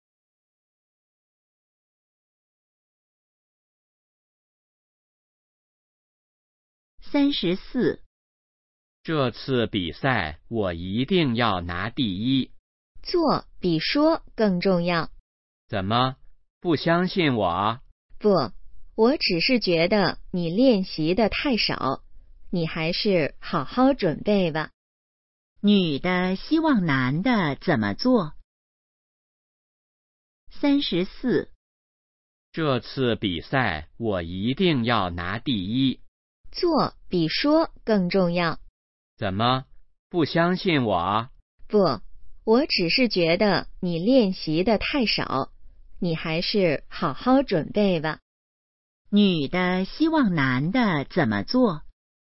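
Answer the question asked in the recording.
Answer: 好好准备(多练习)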